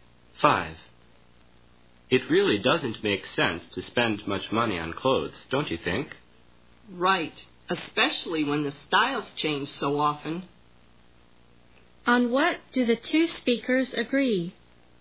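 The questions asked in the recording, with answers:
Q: On what do the two speakers agree?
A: It doesn't make sense to spend much money on clothes.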